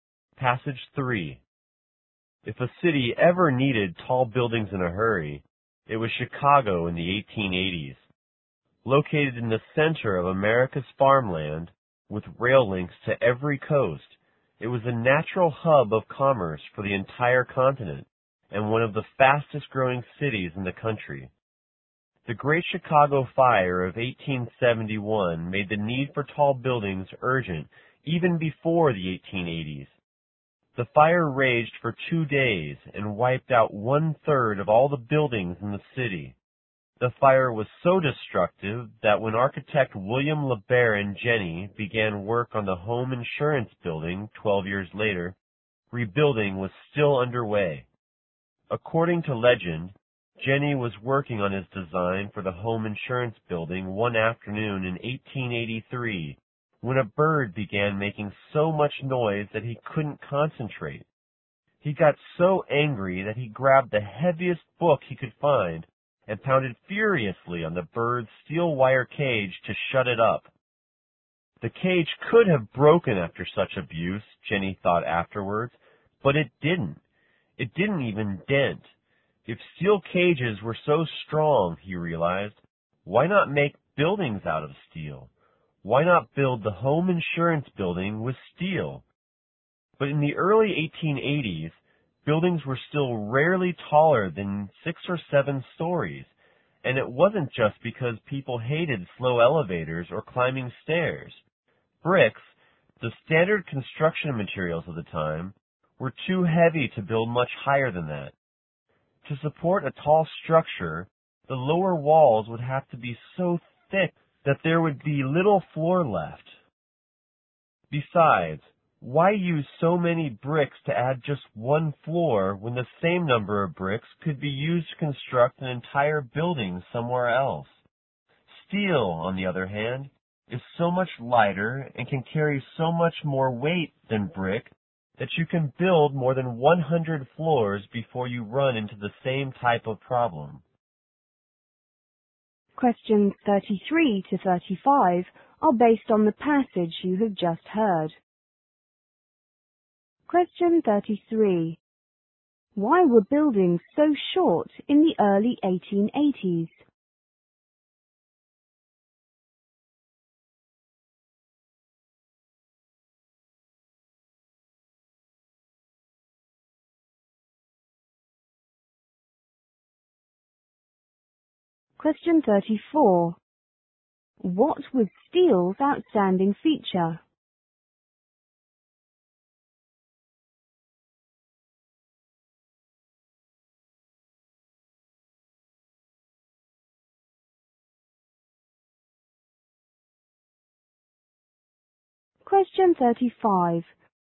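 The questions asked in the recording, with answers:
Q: Why were buildings so short in the early 1880s?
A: Bricks were too heavy to build higher

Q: What was steel's outstanding feature?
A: It is lighter and can carry much more weight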